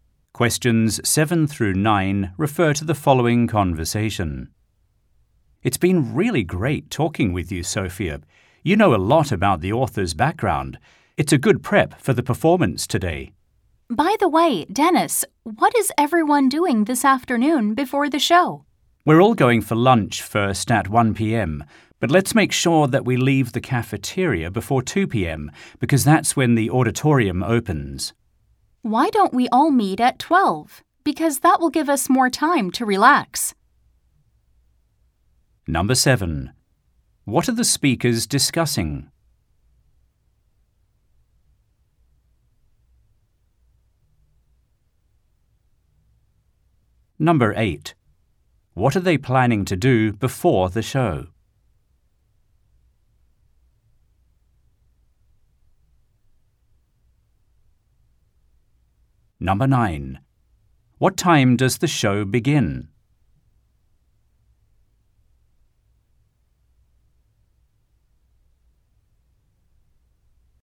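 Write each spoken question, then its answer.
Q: What are they planning to do before the show?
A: Go for lunch together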